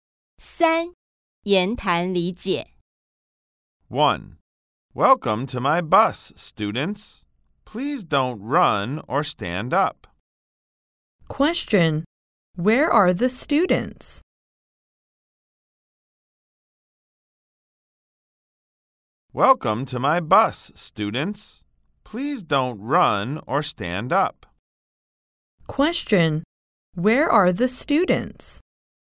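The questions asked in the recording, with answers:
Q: Question. Where are the students?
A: On the bus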